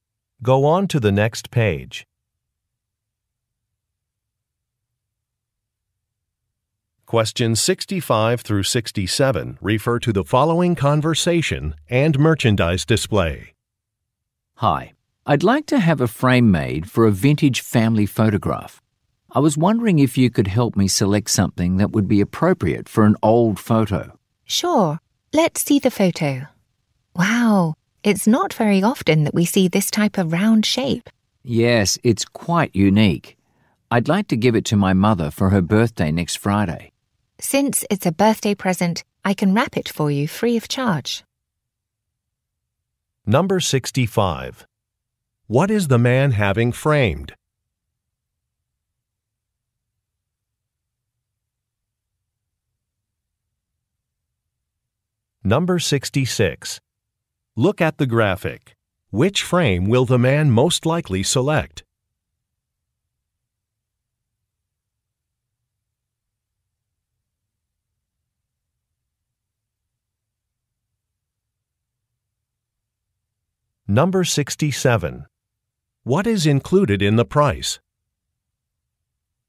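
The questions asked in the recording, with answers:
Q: What is the man having framed?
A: A vintage family photograph

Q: What is included in the price?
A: Free gift wrapping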